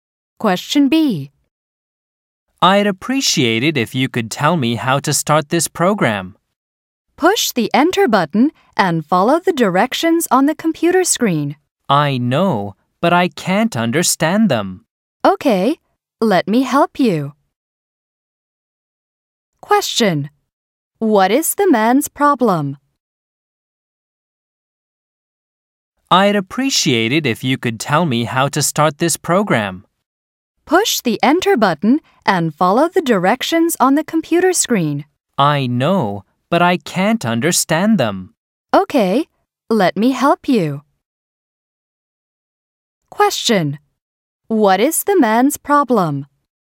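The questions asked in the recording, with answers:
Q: What is the man's problem?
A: He can't understand the directions for starting the program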